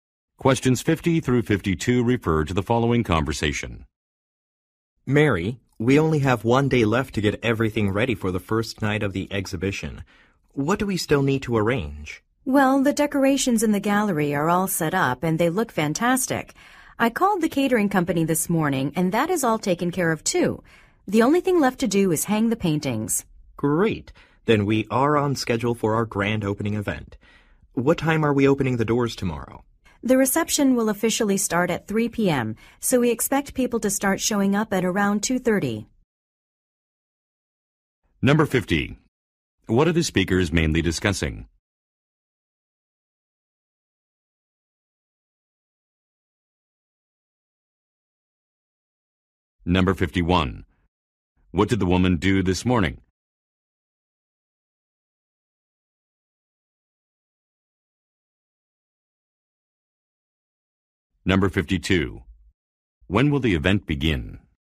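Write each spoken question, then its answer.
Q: What are the speakers mainly discussing?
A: Preparing for an exhibition opening

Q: What did the woman do this morning?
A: Called the catering company

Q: When will the event begin?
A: At 3 p.m.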